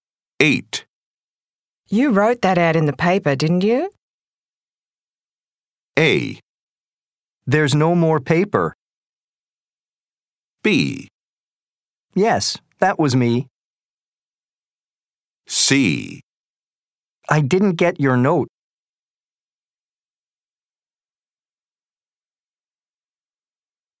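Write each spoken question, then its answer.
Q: You wrote that ad in the paper, didn't you?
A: B: Yes, that was me.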